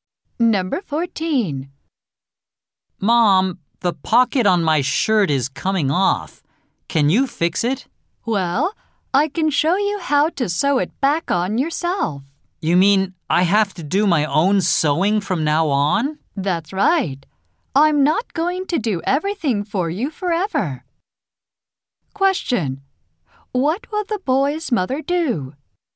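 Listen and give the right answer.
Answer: Show him how to sew the pocket back on himself.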